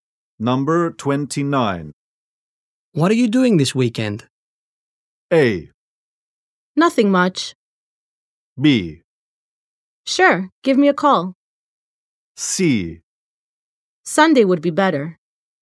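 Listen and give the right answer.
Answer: A: Nothing much.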